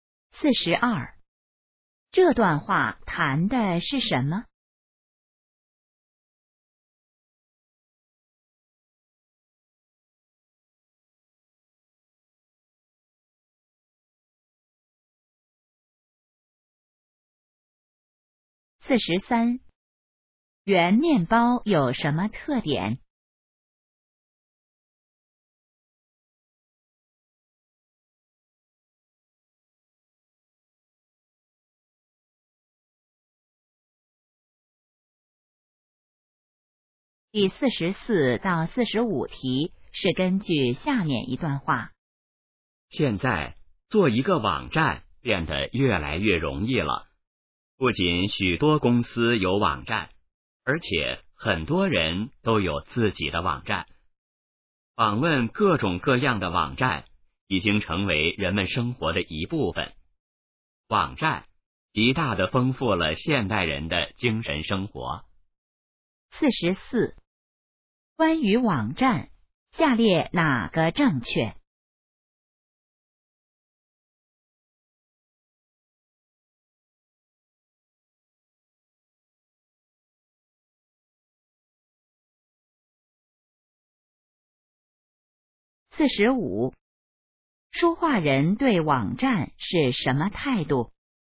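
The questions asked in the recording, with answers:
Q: 关于网站,下列哪个正确?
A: 做网站越来越容易了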